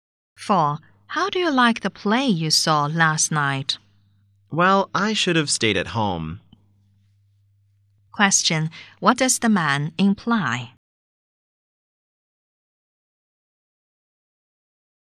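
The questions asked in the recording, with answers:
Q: What does the man imply?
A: The play was not worth seeing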